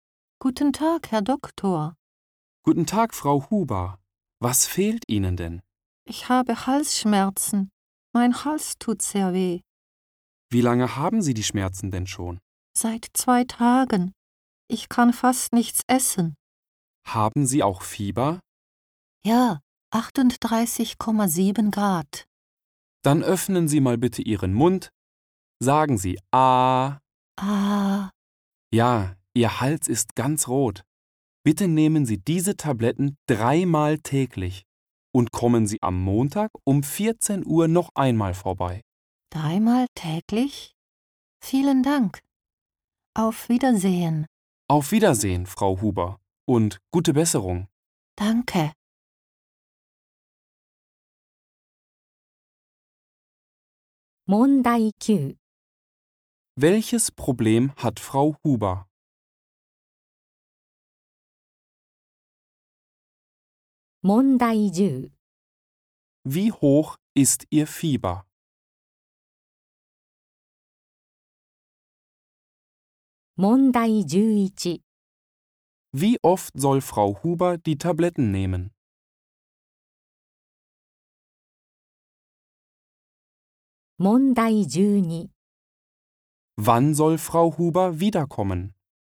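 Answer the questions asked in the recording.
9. Sie hat Halsschmerzen.
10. 38,7 Grad
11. 3-mal täglich
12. Am Montag um 14 Uhr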